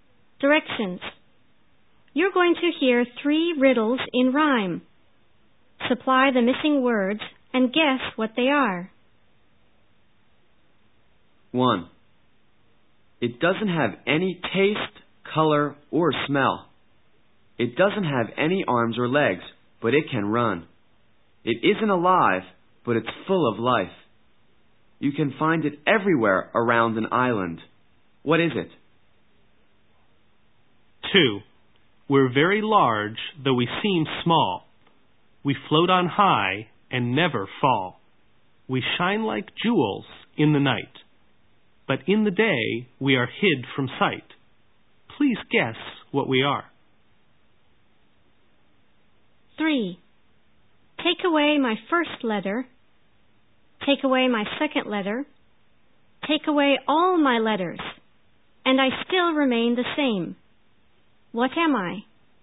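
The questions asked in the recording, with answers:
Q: What is it?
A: Water

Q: Please guess what we are.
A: Stars

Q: What am I?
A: A postman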